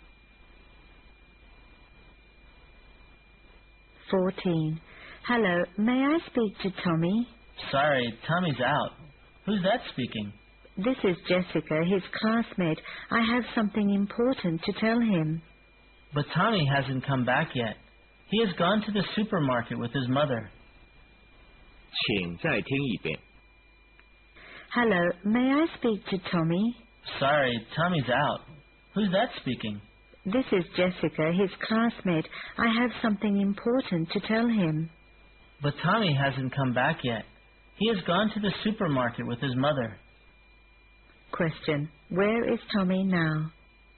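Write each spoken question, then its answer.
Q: Where is Tommy now?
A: At the supermarket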